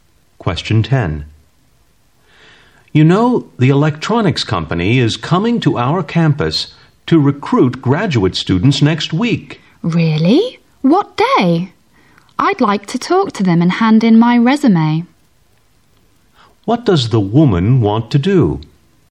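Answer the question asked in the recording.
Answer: Talk to the company's recruiters and hand in her resume.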